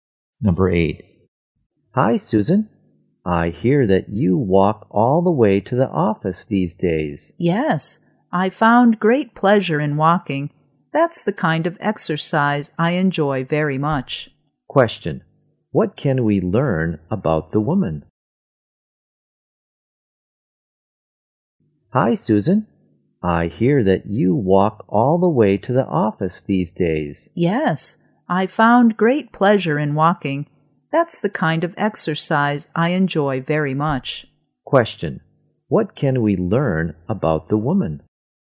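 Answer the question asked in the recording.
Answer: She enjoys walking to the office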